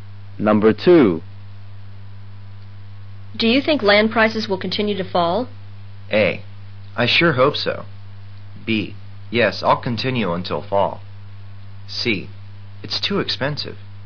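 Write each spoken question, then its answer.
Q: Do you think land prices will continue to fall?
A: A: I sure hope so.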